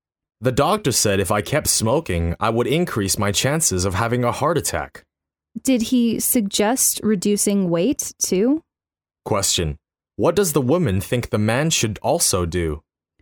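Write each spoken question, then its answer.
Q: What does the woman think the man should also do?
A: Lose weight.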